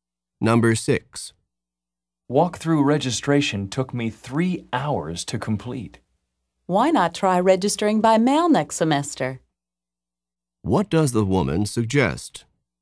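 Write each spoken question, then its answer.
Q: What does the woman suggest?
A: Registering by mail next semester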